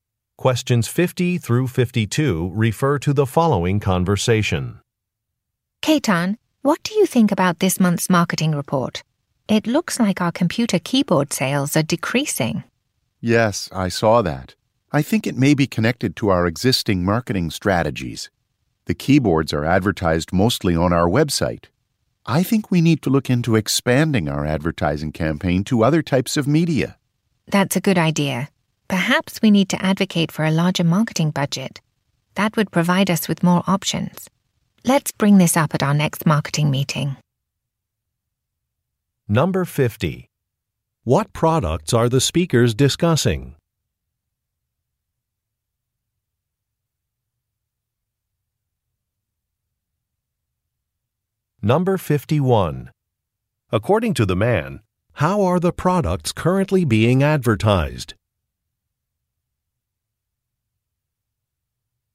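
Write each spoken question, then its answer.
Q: What products are the speakers discussing?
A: Computer keyboards

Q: According to the man, how are the products currently being advertised?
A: Mostly on the company website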